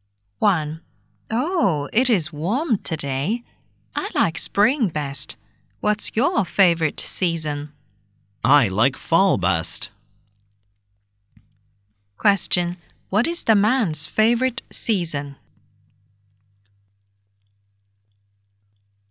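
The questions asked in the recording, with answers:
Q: What is the man's favorite season?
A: Fall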